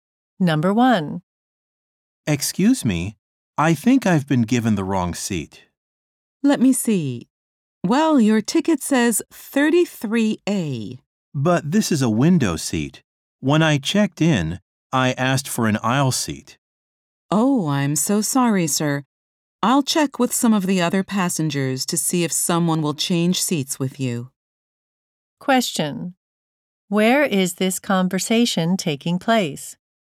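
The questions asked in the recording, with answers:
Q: Where is this conversation taking place?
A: On an airplane.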